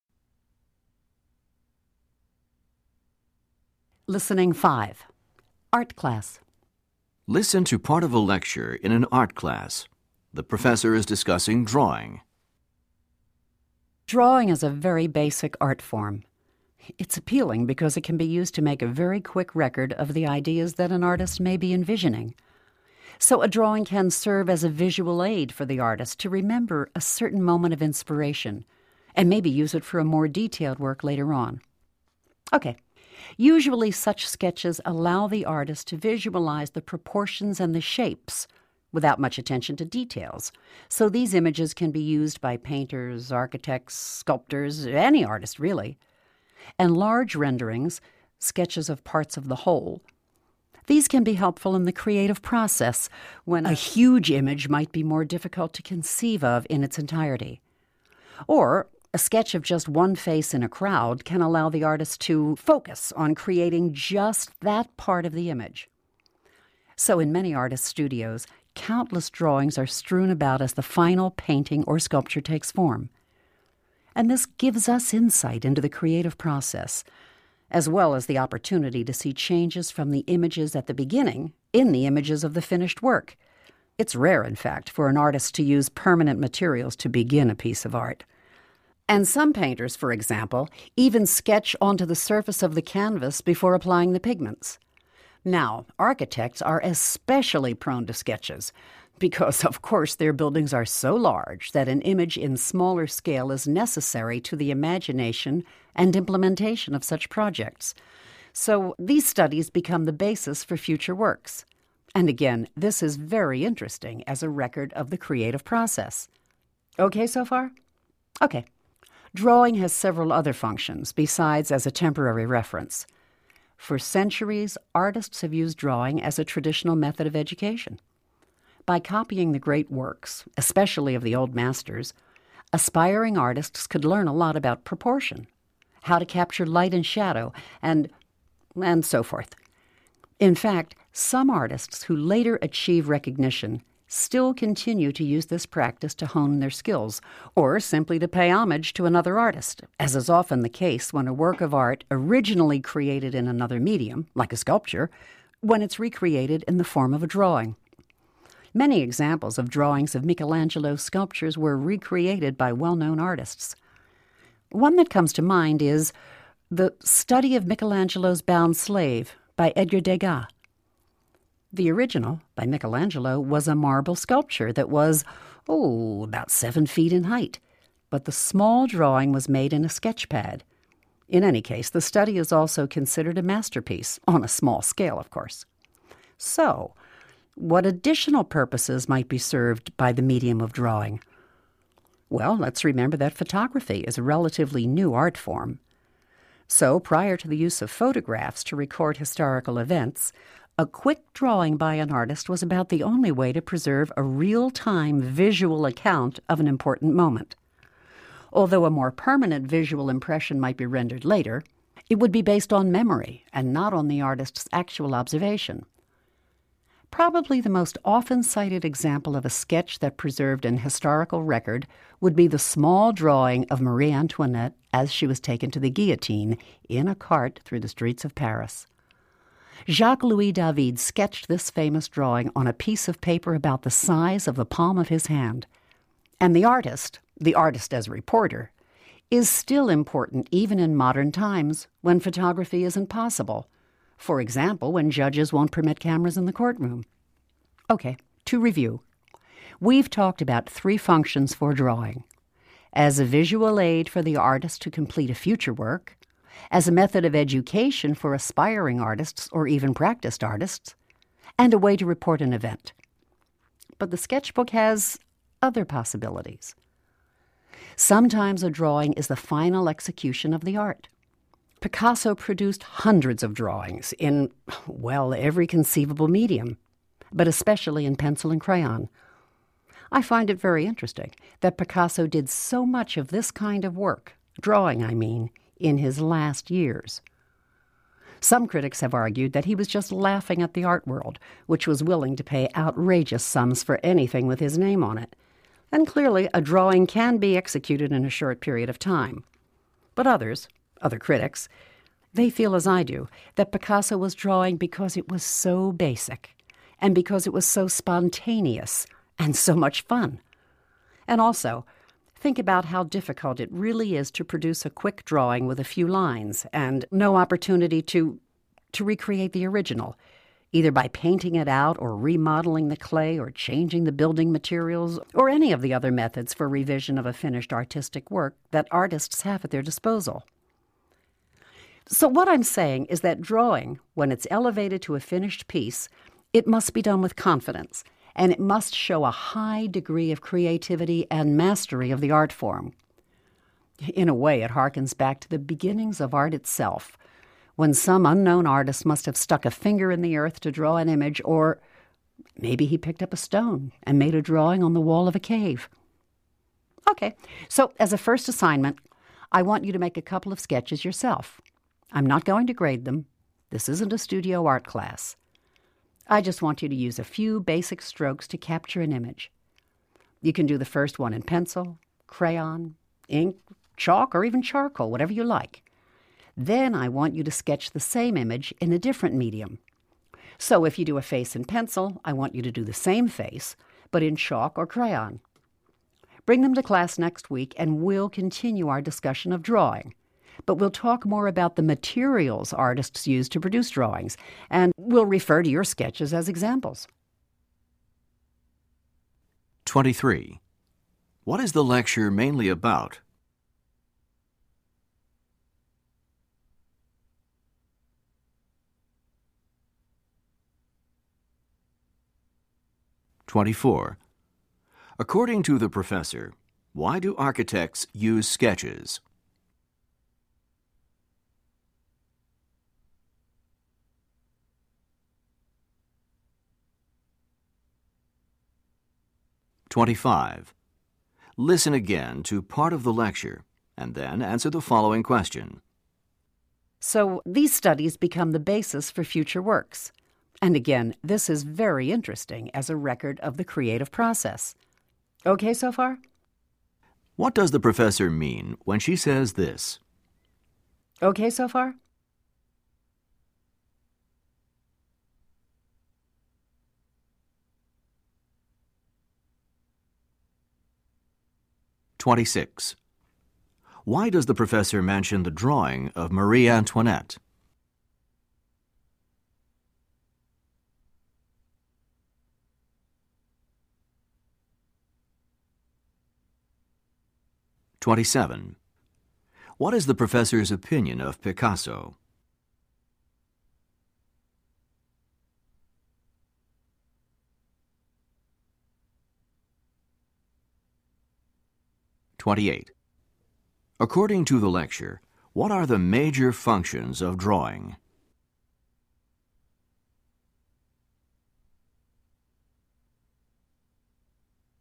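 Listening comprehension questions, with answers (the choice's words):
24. What is the lecture mainly about?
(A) The way that drawing has influenced art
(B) The relationship between drawing and other art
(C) The distinct purposes of drawing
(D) The reason that artists prefer drawing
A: The distinct purposes of drawing

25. According to the professor, why do architects use sketches?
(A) Architects are not clear about the final design at the beginning.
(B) To design large buildings, architects must work in a smaller scale.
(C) Engineers use the architect's sketches to implement the details.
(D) Sketches are used as a record of the stages in development.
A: To design large buildings, architects must work in a smaller scale.

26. What does the professor mean when she says this: "Okay so far?"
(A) She is checking to be sure that the students understand.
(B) She is expressing uncertainty about the information.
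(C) She is inviting the students to disagree with her.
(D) She is indicating that she is in a hurry to continue.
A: She is checking to be sure that the students understand.

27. Why does the professor mention the drawing of Marie Antoinette?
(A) It is an example of a work copied in another medium.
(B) Drawing was typical of the way that artists were educated.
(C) The sketch was a historical account of an important event.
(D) The size of the drawing made it an exceptional work of art.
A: The sketch was a historical account of an important event.

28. What is the professor's opinion of Picasso?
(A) Picasso was probably playing a joke by offering drawings for sale.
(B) At the end of his career, Picasso may have chosen drawing because it was easy.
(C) Picasso's drawings required the confidence and skill of a master artist.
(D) Cave drawings were the inspiration for many of Picasso's works.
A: Picasso's drawings required the confidence and skill of a master artist.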